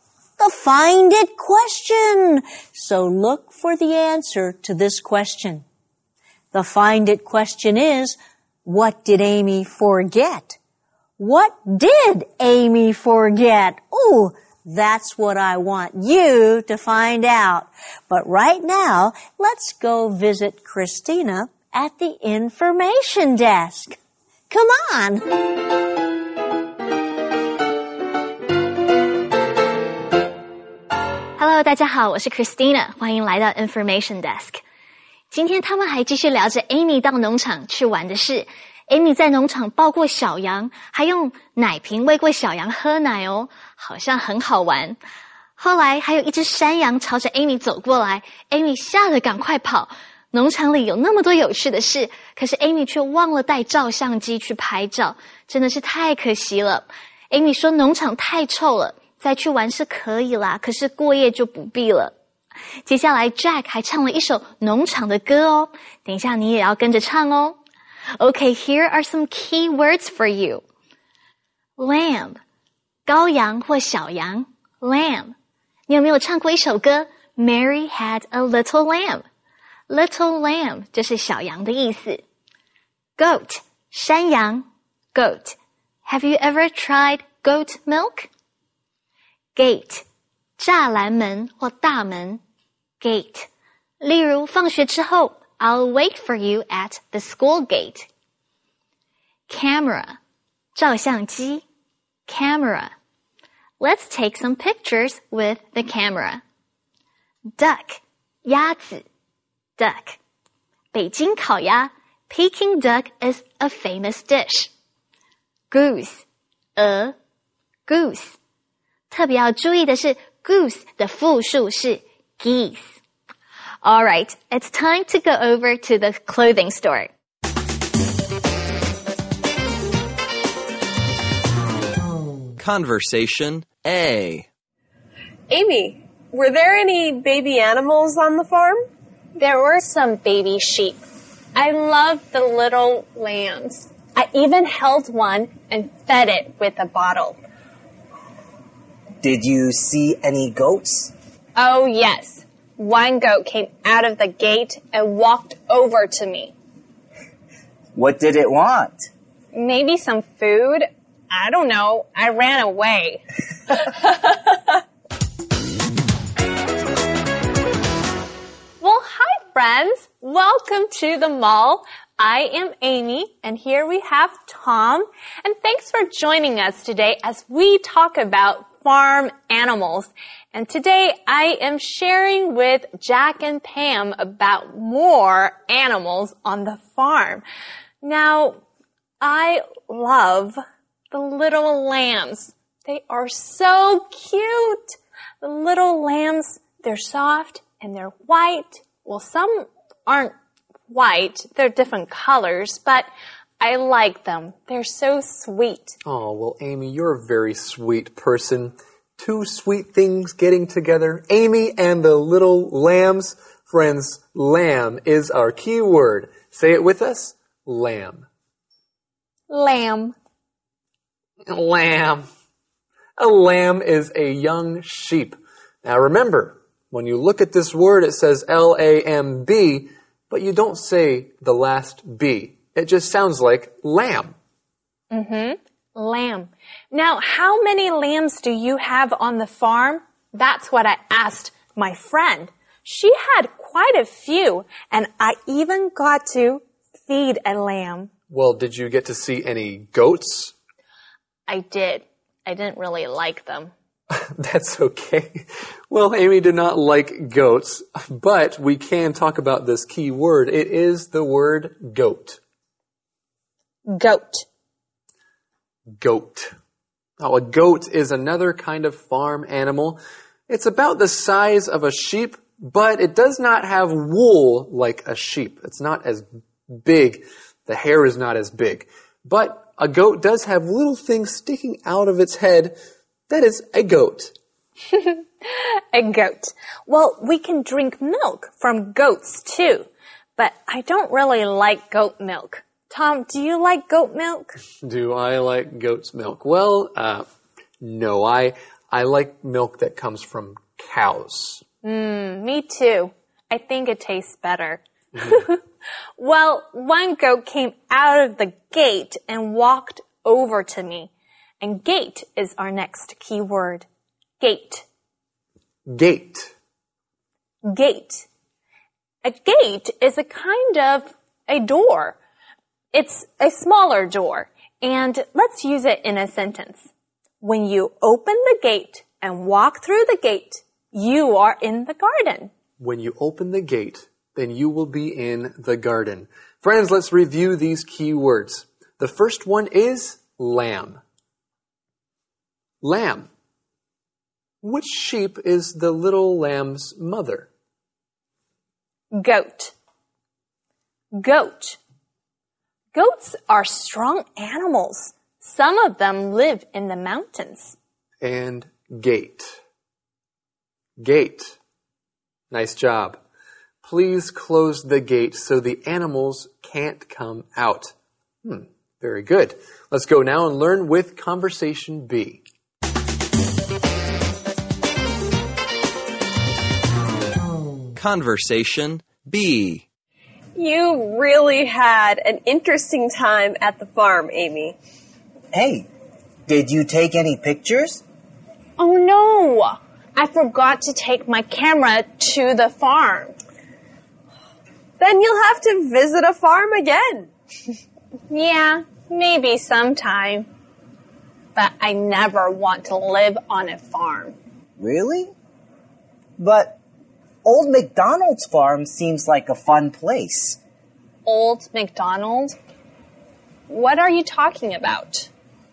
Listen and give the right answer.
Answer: Amy forgot to take her camera to the farm.